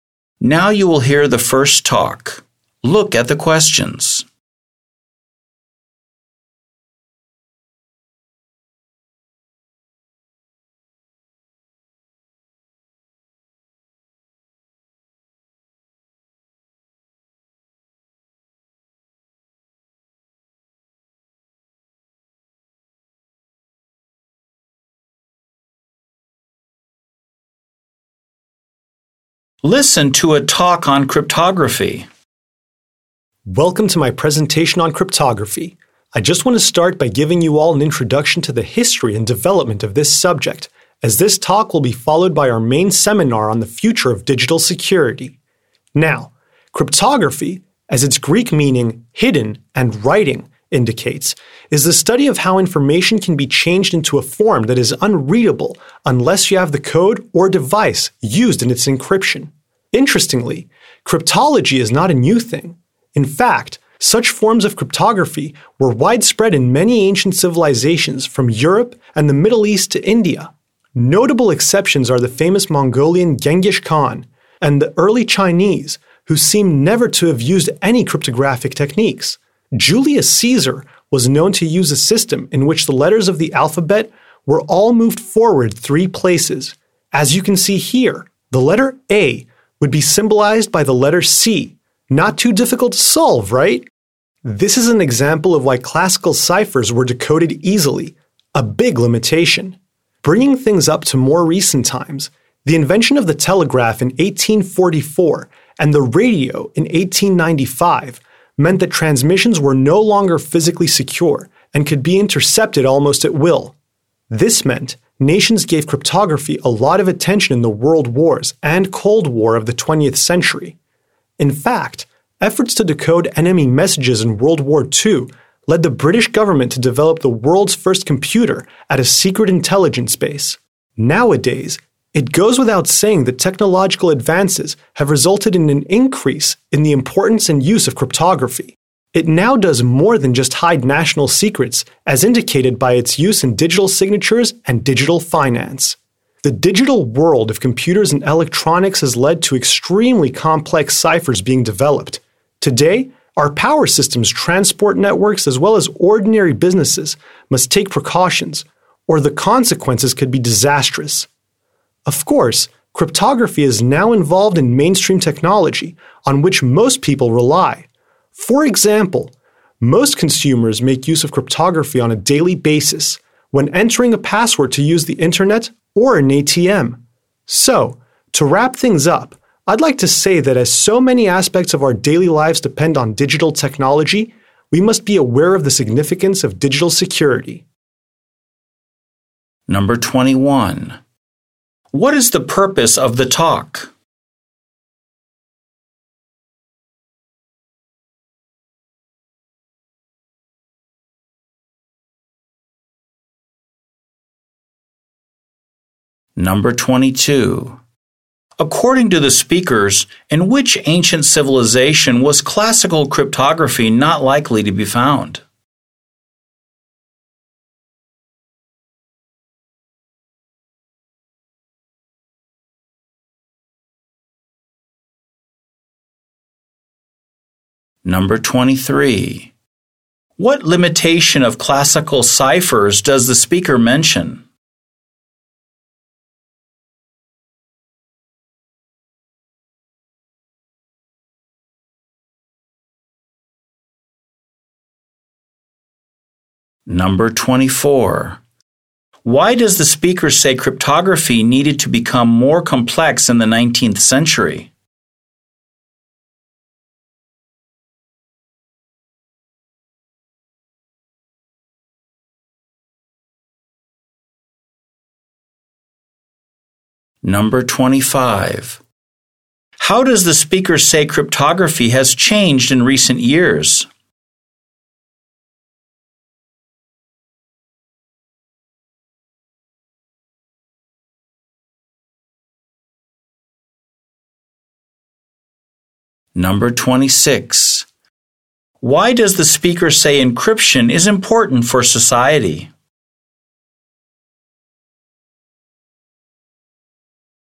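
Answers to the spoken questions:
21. To introduce the history and development of cryptography before the seminar on digital security
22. Early China (and Genghis Khan's Mongols)
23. They were easily decoded
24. The telegraph and radio meant transmissions could be intercepted
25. It does more than hide national secrets; it is used in digital signatures and finance
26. So many aspects of daily life depend on digital technology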